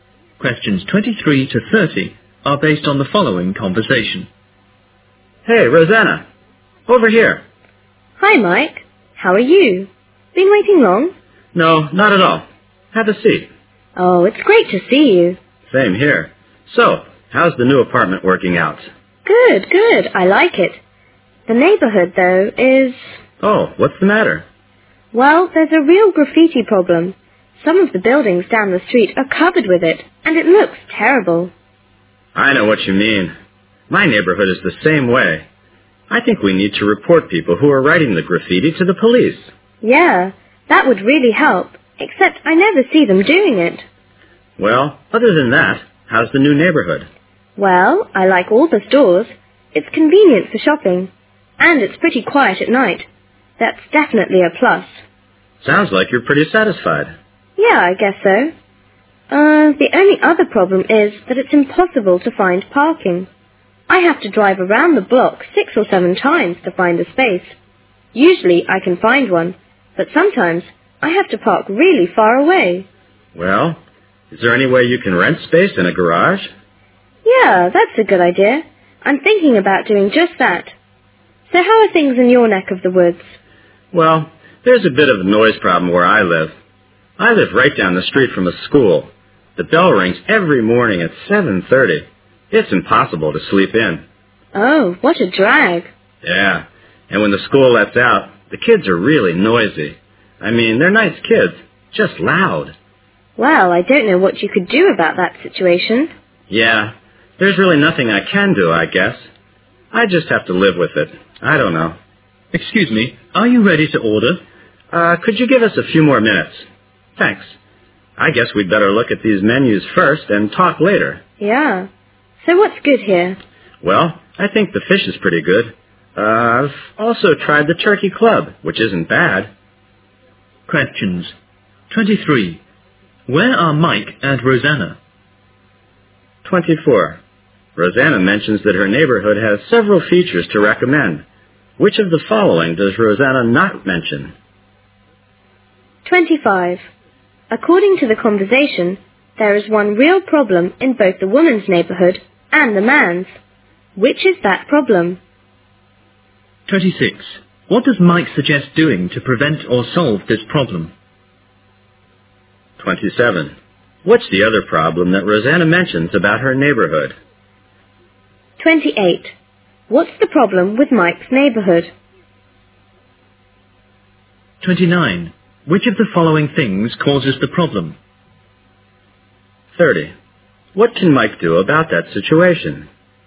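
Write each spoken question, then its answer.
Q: Where are Mike and Rosanna?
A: In a restaurant

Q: Which is that problem?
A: Graffiti

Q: What does Mike suggest doing to prevent or solve this problem?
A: Report the people writing graffiti to the police

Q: What's the other problem that Rosanna mentions about her neighborhood?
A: It's impossible to find parking

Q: What's the problem with Mike's neighborhood?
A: Noise

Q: Which of the following things causes the problem?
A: A nearby school (the morning bell and noisy kids)

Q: What can Mike do about that situation?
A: Nothing; he just has to live with it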